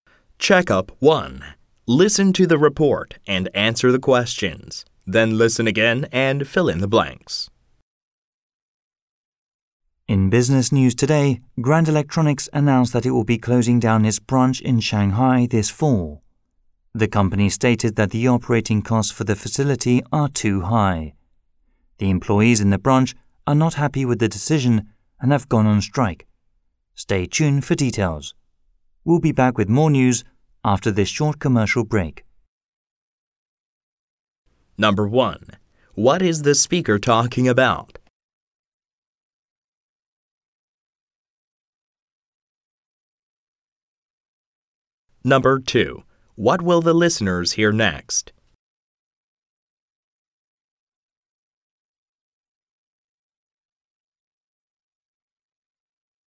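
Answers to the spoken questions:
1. Grand Electronics closing its Shanghai branch
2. A commercial break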